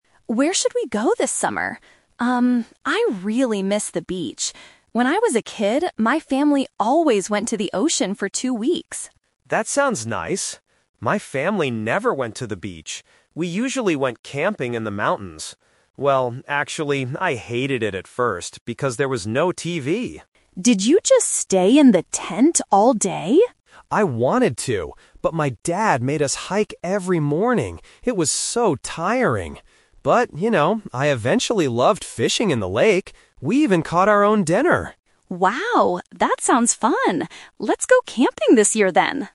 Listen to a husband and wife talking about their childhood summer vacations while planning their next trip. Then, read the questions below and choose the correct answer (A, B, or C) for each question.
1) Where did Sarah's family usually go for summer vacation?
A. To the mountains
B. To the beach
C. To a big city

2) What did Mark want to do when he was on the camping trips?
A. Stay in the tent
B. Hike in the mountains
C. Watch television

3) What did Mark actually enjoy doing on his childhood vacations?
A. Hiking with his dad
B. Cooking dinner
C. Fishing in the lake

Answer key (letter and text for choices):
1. B. To the beach
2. A. Stay in the tent
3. C. Fishing in the lake

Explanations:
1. Sarah says, "When I was a kid, my family always went to the ocean" (ocean = beach). Option (A) is a trap; the mountains are where Mark's family went, not Sarah's. Option (C) is a plausible vacation spot, but it is not mentioned in the audio.
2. When Sarah asks, "Did you just stay in the tent all day?", Mark replies, "I wanted to!". Option (B) is a trap; he had to hike because his dad made him, but he didn't want to. Option (C) is a trap; he hated camping at first because there was no TV, but "watching TV" was impossible there, so his plan was to just stay in the tent.
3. Mark clearly states, "I eventually loved fishing in the lake." Option (A) is a trap; hiking is mentioned, but he thought it was "tiring," not enjoyable. Option (B) is a trap; they caught their dinner, but the audio doesn't say he enjoyed cooking it.

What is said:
Sarah: Where should we go this summer? Um, I really miss the beach. When I was a kid, my family always went to the ocean for two weeks.
Mark: That sounds nice. My family never went to the beach. We usually went camping in the mountains. Well, actually, I hated it at first because there was no TV.
Sarah: Did you just stay in the tent all day?
Mark: I wanted to! But my dad made us hike every morning. It was so tiring. But, you know, I eventually loved fishing in the lake. We even caught our own dinner!